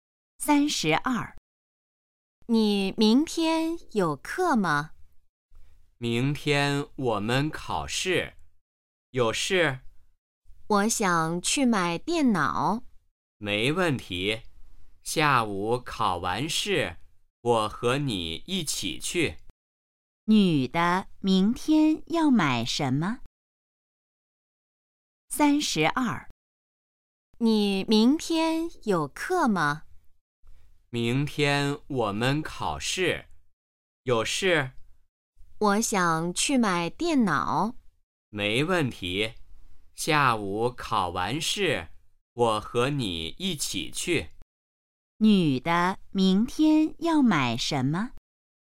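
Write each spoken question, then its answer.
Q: 女的明天要买什么?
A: 电脑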